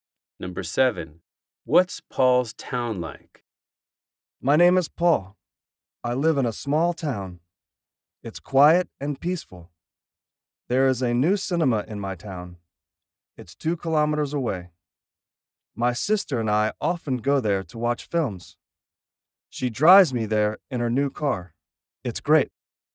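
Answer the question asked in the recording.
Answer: Small, quiet and peaceful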